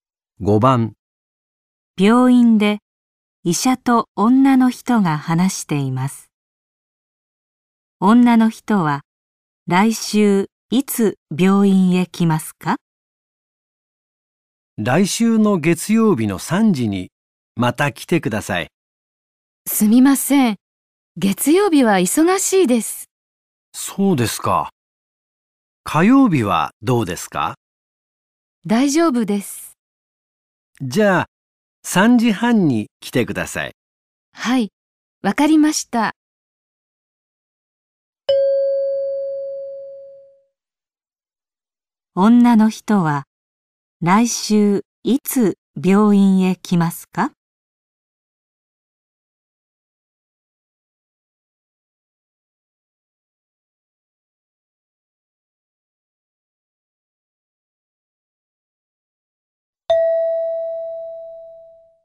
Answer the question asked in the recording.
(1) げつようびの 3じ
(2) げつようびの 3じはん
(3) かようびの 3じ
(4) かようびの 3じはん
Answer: (4) かようびの 3じはん

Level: N5 Listening · Test 3